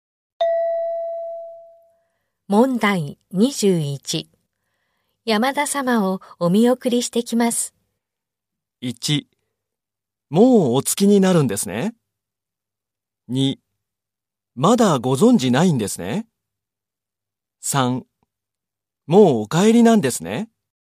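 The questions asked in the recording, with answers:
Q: 山田様をお見送りしてきます。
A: 3: もうお帰りなんですね。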